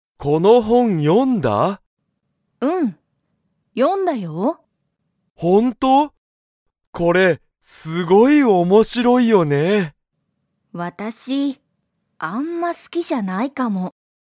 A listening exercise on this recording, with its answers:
ユウコは、その本ほんを読よみましたか?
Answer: はい

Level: Level 1